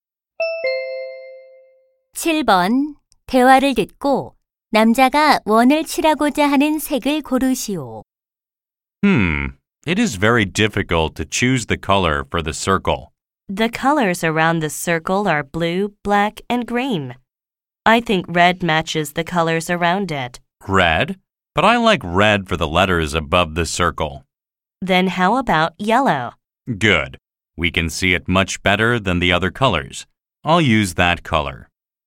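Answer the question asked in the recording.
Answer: 노란색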